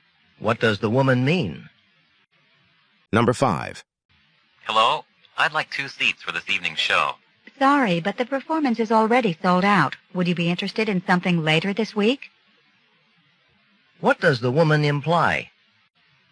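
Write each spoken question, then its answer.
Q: What does the woman imply?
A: There are no seats tonight, but he could see a show later in the week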